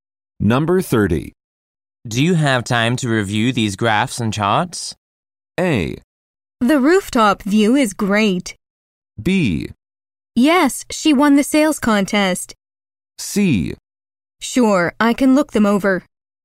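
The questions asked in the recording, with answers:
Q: Do you have time to review these graphs and charts?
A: C: Sure, I can look them over.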